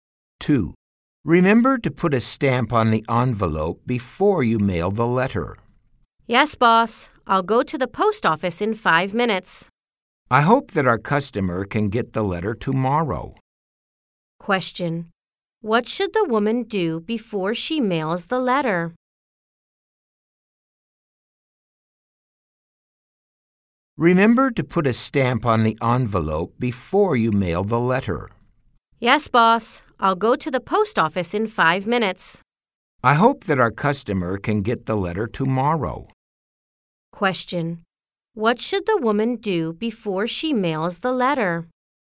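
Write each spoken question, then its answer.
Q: What should the woman do before she mails the letter?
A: Put a stamp on the envelope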